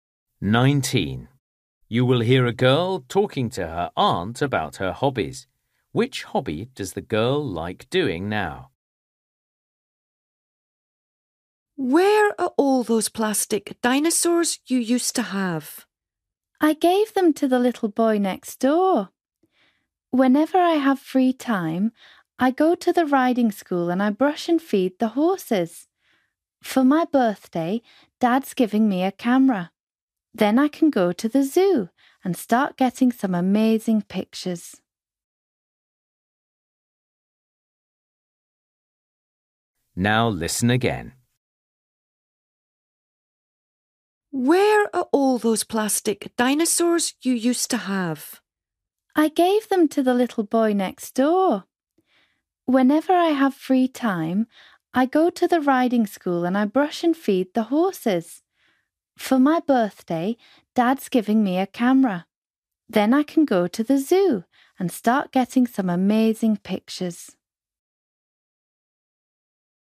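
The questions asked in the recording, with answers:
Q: Which hobby does the girl like doing now?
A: Looking after horses at the riding school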